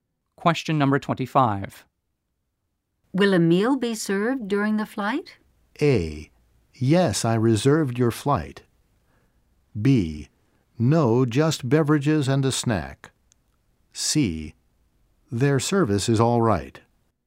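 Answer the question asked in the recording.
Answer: B: No, just beverages and a snack.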